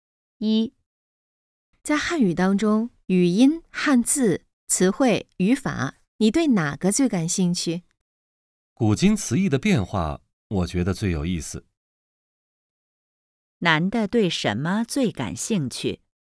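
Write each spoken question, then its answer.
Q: 男的对什么最感兴趣?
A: 古今词义的变化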